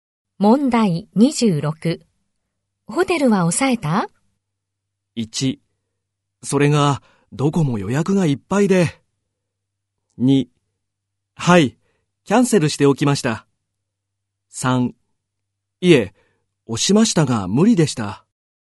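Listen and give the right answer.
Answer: 1: それがどこも予約がいっぱいで。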